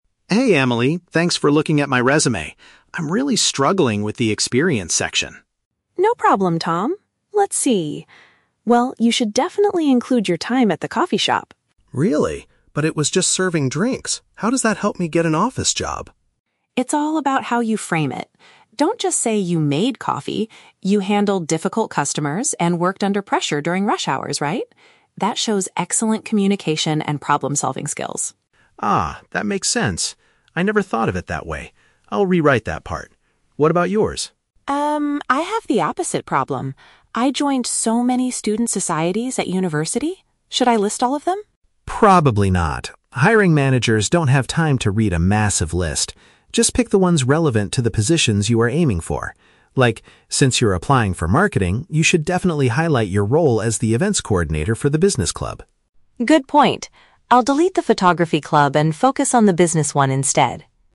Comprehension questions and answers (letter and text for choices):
Listen to the conversation between two recent graduates and choose the correct answer (A, B, or C) for each question.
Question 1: Why was the man initially hesitant to include his cafe job on his resume?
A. He didn't work there for a long time.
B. He thought the work was unrelated to a professional career.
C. He had a bad relationship with the manager there.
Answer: B. He thought the work was unrelated to a professional career.

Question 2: What ability does the woman suggest the man highlight from his part-time work?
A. His capability to deal with challenging people.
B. His speed at preparing various types of drinks.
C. His skill in training new staff members.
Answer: A. His capability to deal with challenging people.

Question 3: What does the man advise the woman to do with her university activities?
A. Write a detailed description of her time in the photography club.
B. Place them at the very top of her document.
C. Only mention the groups that match her career goals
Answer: C. Only mention the groups that match her career goals

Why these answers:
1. Tom says "But it was just serving drinks. How does that help me get an office job?". This means he thinks the cafe job is not relevant to an "office job" (which is paraphrased as "a professional career" in the option). Option (A) and (C) are plausible reasons in real life but are not mentioned in the audio.
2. Emily tells Tom that he "handled difficult customers". The phrase "deal with challenging people" is a direct paraphrase of this. Option (B) is The Trap: Making drinks/coffee is mentioned ("Don't just say you made coffee"), but Emily explicitly tells him NOT to focus on that. Option (C) is not mentioned.
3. Tom advises her to "pick the ones relevant to the positions you are aiming for". This is paraphrased perfectly in option (C) as "match her career goals". Option (A) is The Trap: The "photography club" is mentioned, but Emily decides to delete it, not write a detailed description of it. Option (B) is not mentioned.

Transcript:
Tom: Hey Emily, thanks for looking at my resume. I'm really struggling with the experience section.
Emily: No problem, Tom! Let's see... Well, you should definitely include your time at the coffee shop.
Tom: Really? But it was just serving drinks. How does that help me get an office job?
Emily: It's all about how you frame it! Don't just say you made coffee. You handled difficult customers and worked under pressure during rush hours, right? That shows excellent communication and problem-solving skills.
Tom: Ah, that makes sense. I never thought of it that way. I'll rewrite that part. What about yours?
Emily: Um, I have the opposite problem. I joined so many student societies at university. Should I list all of them?
Tom: Probably not. Hiring managers don't have time to read a massive list. Just pick the ones relevant to the positions you are aiming for. Like, since you're applying for marketing, you should definitely highlight your role as the events coordinator for the business club.
Emily: Good point. I'll delete the photography club and focus on the business one instead.